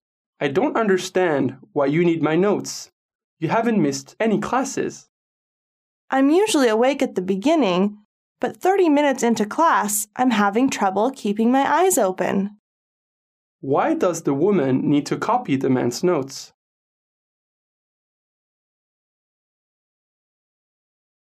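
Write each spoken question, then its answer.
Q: Why does the woman need to copy the man's notes?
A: She gets sleepy and can't stay awake in class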